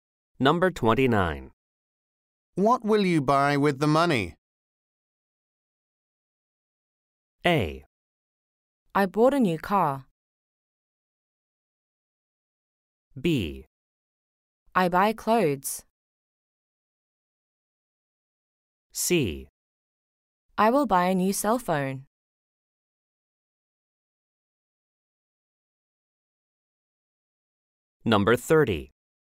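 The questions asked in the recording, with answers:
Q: What will you buy with the money?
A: C: I will buy a new cell phone.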